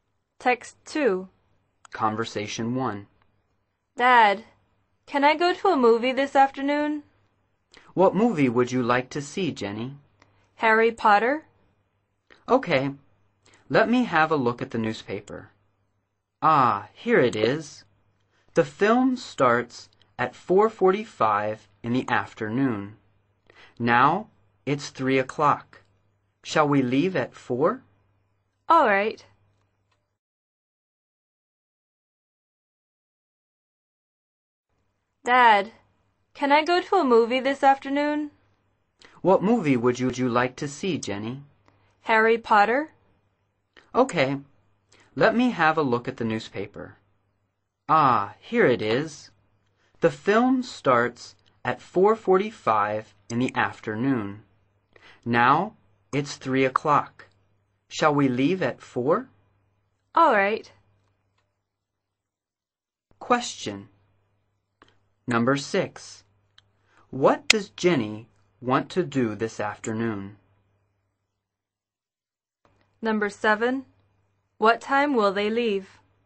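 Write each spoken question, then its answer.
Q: What does Jenny want to do this afternoon?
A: Go to a movie (Harry Potter)

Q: What time will they leave?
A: At 4 o'clock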